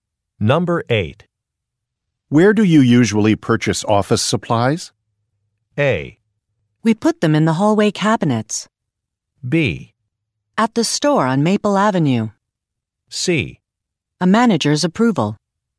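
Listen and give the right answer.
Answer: B: At the store on Maple Avenue.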